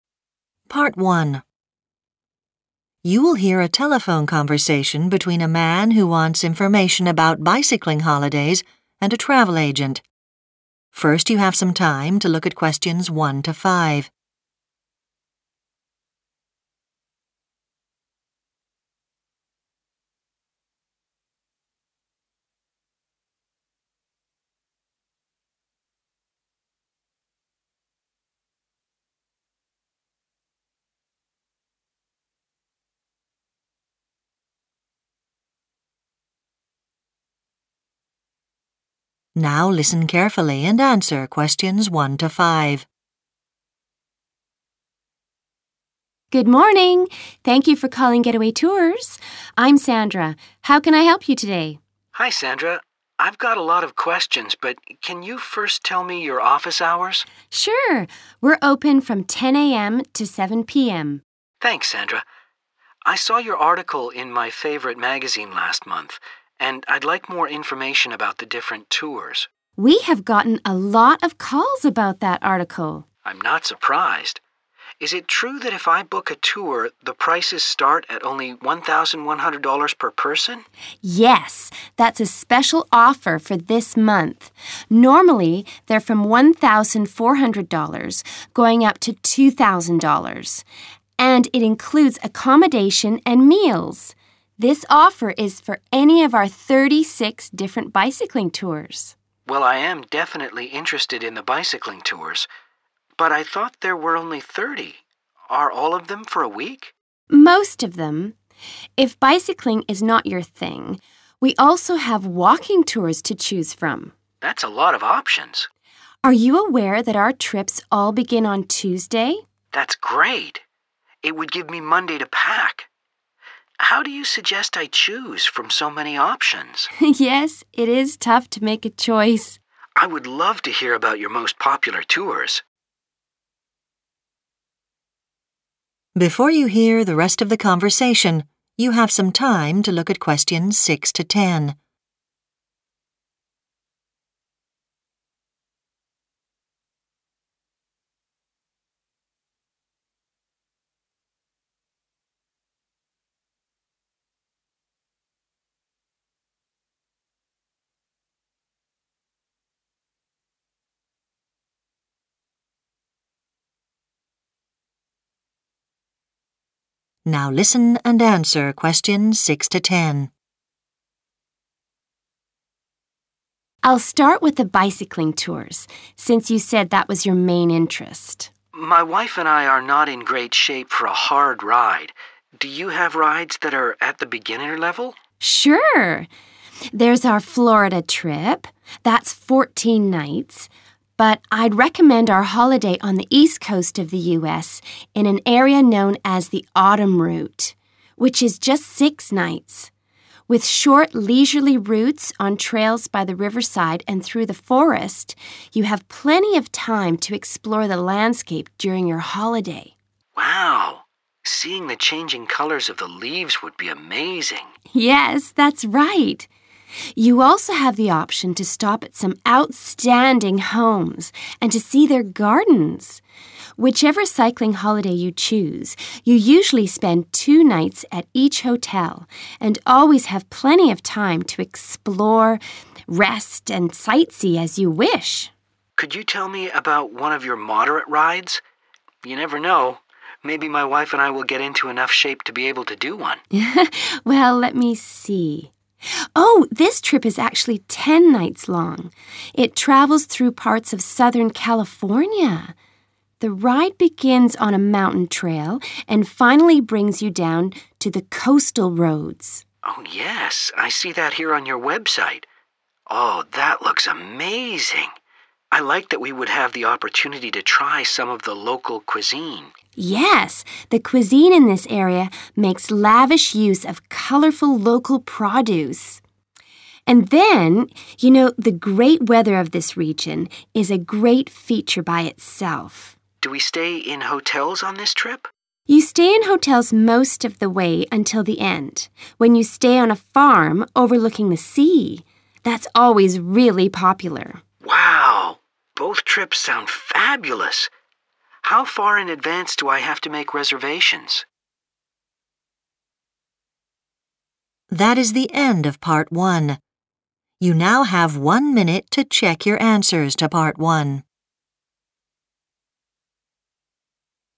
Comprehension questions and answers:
Complete the notes below.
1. Cost of cheapest tour per person is 1 $ ............... (this month only)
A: 1100

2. The number of bicycle trips to choose from is 2 ...............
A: 36

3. Most tours last a 3 ...............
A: week

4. This company offers 4 ............... holidays as well as bicycling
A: walking

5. Travellers start their trips on 5 ...............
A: Tuesday

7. Riverside and 7 ............... trails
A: forest

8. Beautiful homes and 8 ...............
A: gardens

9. Mountain trail and 9 ............... roads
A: coastal

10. Hotels and a 10 ...............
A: farm